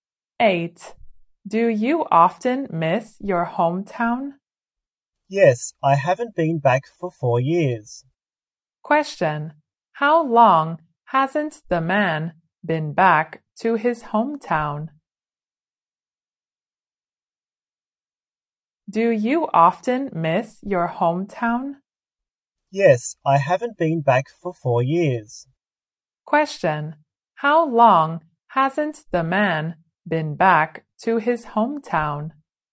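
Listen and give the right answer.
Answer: For 4 years.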